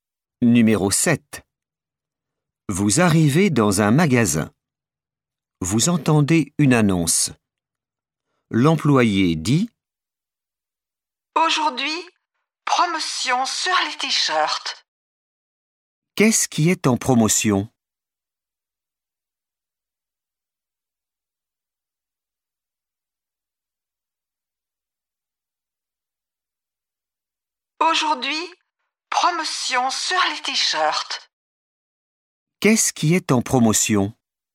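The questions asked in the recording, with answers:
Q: Qu'est-ce qui est en promotion?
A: les t-shirts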